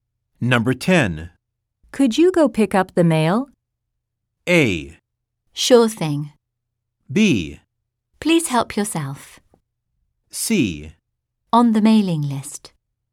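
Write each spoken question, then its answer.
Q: Could you go pick up the mail?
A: A: Sure thing.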